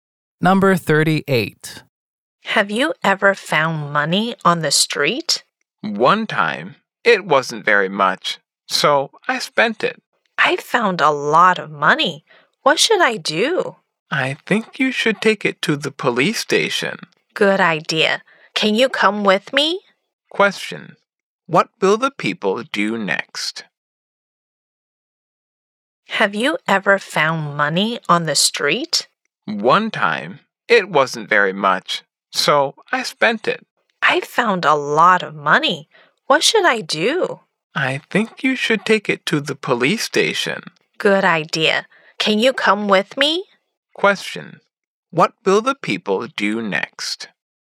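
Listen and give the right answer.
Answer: Take the money to the police station.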